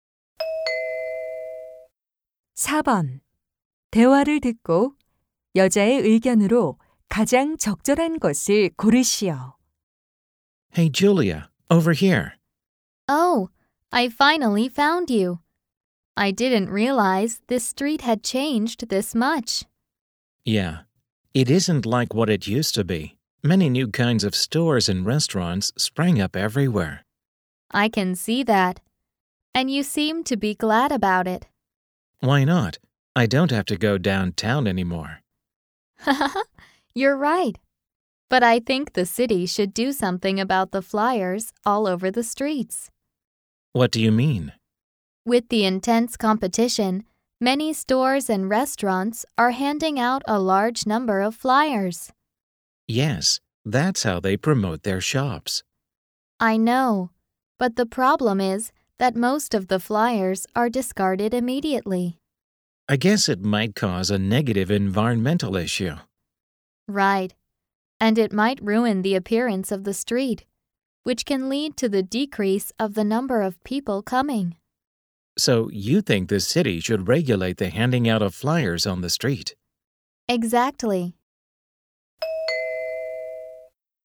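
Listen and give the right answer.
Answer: 시는 거리에서 전단지 배포를 규제해야 한다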